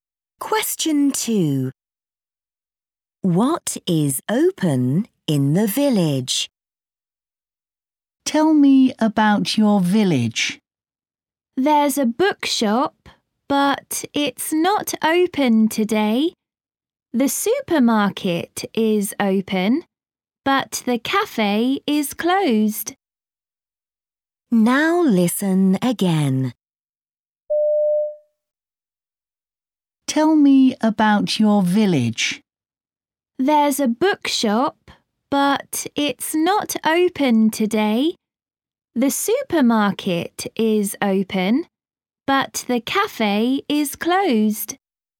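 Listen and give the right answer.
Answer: The supermarket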